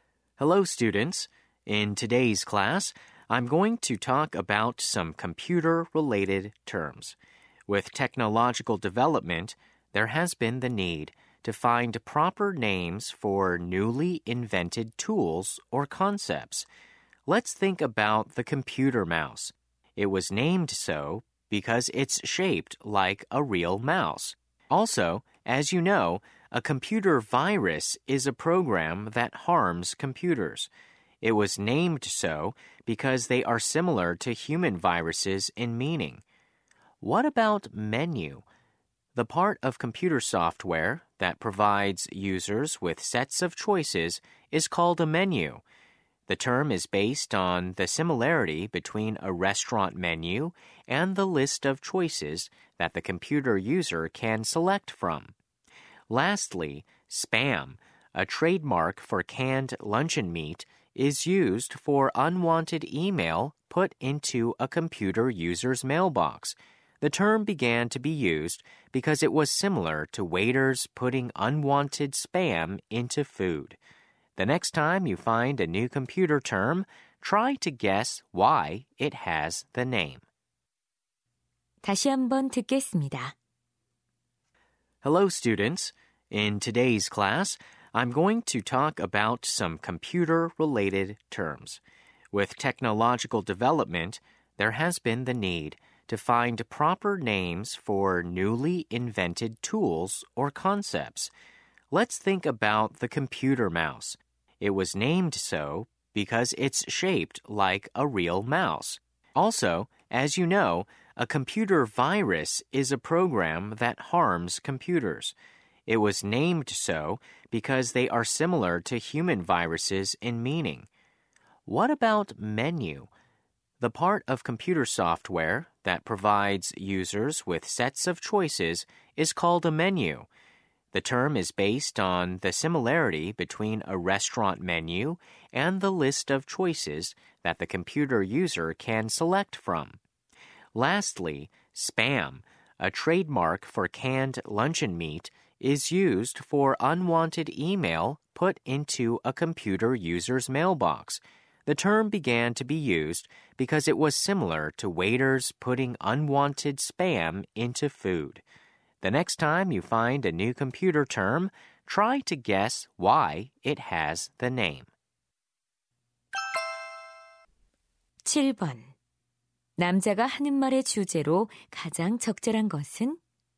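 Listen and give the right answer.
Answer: 컴퓨터 용어가 이름을 얻게 된 유래(실제 사물과의 유사성)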